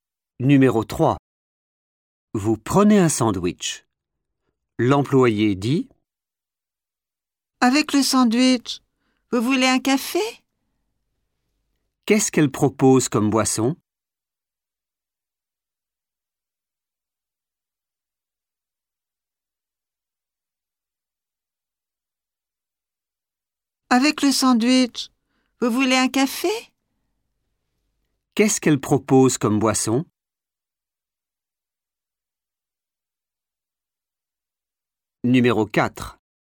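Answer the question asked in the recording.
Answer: un café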